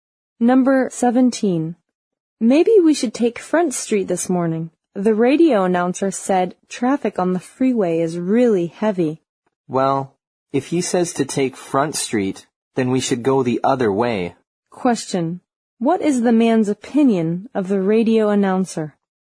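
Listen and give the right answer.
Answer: He doesn't trust him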